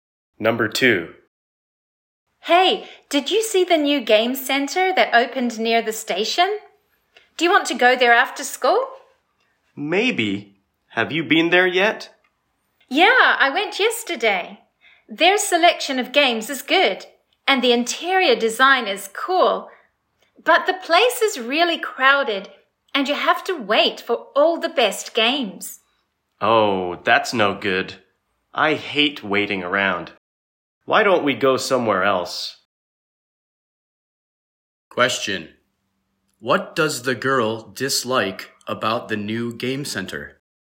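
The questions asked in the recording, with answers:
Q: What does the girl dislike about the new game center?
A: It is crowded and you have to wait for the best games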